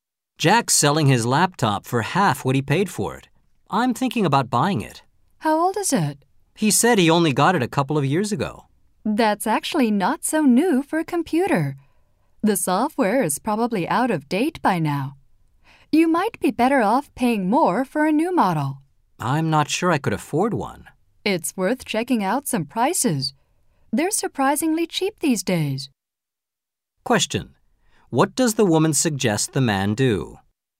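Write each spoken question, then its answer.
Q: What does the woman suggest the man do?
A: Check prices of new laptops instead of buying Jack's old one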